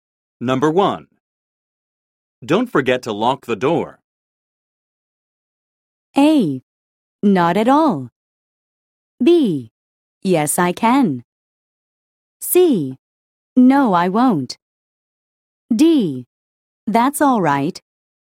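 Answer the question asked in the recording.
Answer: C: No, I won't.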